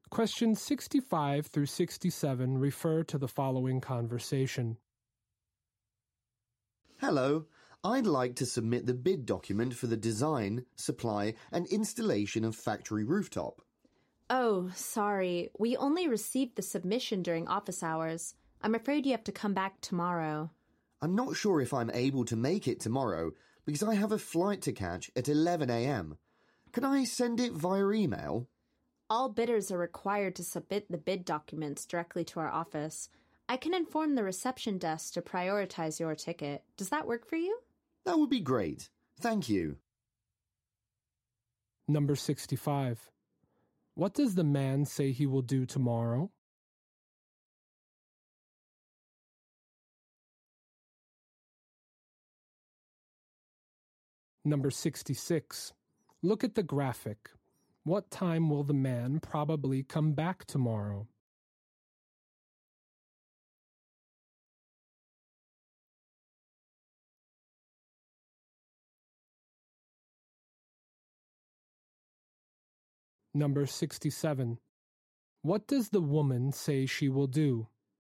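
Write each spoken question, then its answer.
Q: What does the man say he will do tomorrow?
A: Catch a flight at 11 a.m.

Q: What does the woman say she will do?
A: Tell the reception desk to prioritize his ticket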